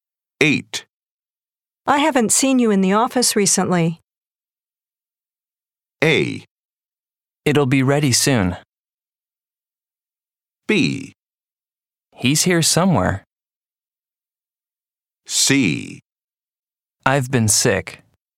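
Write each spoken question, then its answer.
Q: I haven't seen you in the office recently.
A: C: I've been sick.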